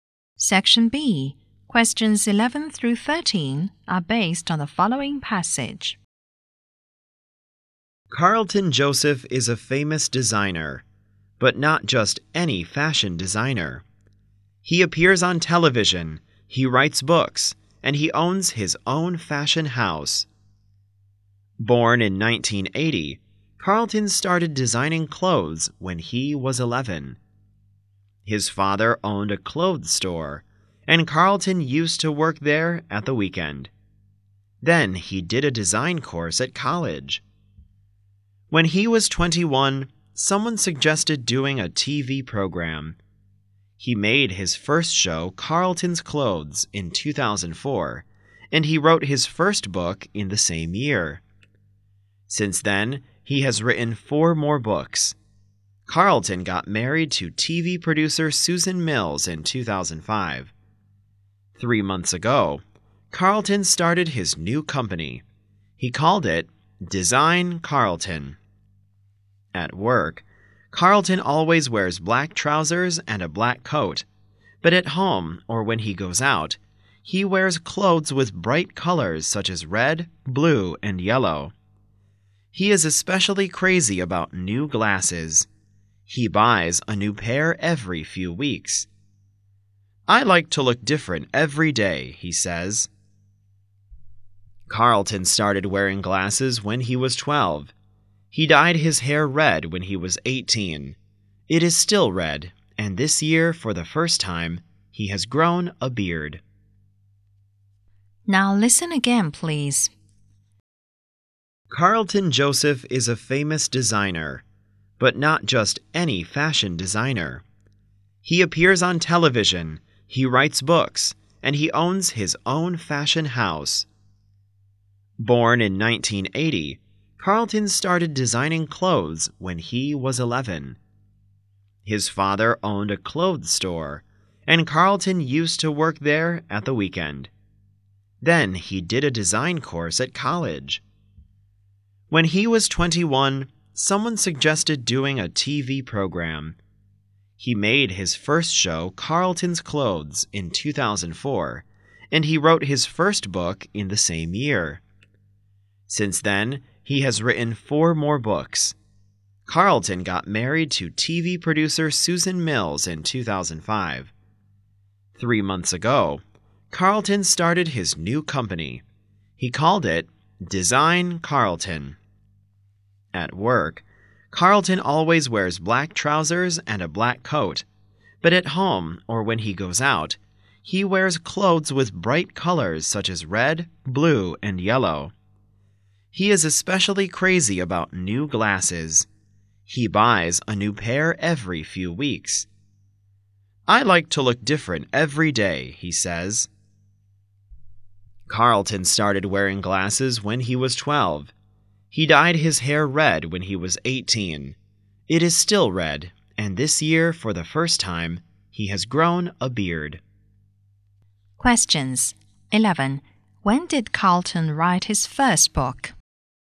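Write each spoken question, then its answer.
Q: When did Carlton write his first book?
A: In 2004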